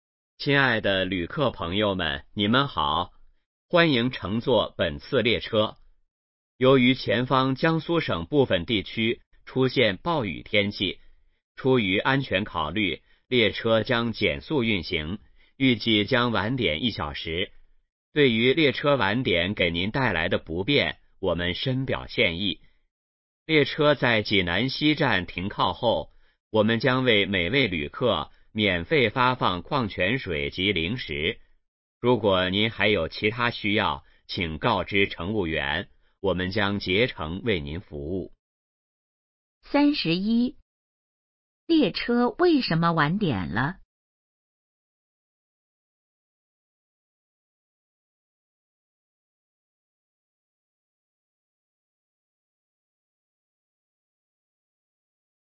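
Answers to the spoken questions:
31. 前方部分地区出现暴雨,列车减速运行
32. 免费发放矿泉水及零食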